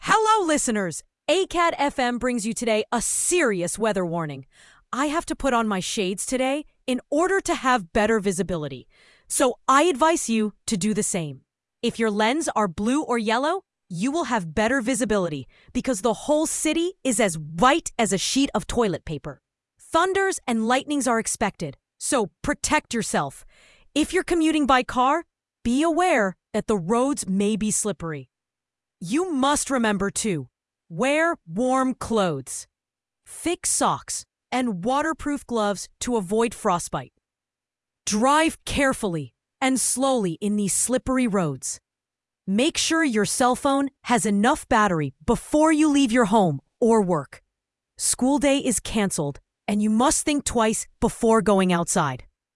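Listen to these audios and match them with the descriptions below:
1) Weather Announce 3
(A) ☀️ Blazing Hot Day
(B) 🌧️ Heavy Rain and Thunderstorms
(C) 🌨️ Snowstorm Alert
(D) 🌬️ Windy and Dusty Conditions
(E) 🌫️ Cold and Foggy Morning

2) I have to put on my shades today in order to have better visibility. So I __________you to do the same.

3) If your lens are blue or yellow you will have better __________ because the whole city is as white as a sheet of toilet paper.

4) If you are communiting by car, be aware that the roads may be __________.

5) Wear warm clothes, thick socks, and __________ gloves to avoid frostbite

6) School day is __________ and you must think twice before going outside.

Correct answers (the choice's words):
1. 🌨️ Snowstorm Alert
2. advise
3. visibility
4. slippery
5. waterproof
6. canceled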